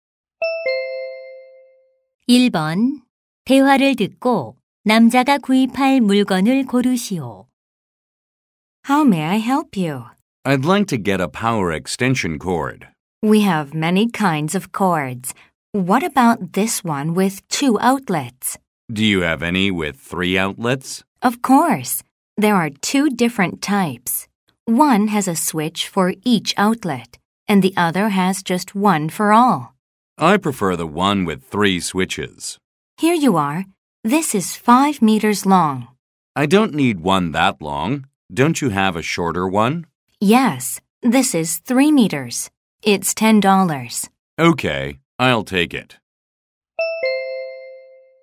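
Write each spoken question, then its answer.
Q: 대화를 듣고 남자가 구입할 물건을 고르시오.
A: 콘센트 3개와 스위치 3개가 있는 3미터 길이의 멀티탭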